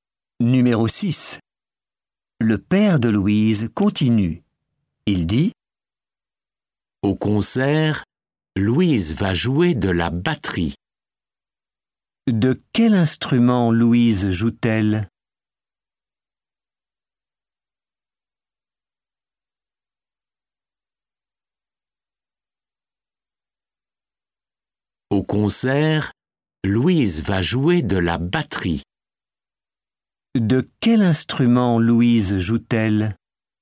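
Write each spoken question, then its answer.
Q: De quel instrument Louise joue-t-elle?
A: de la batterie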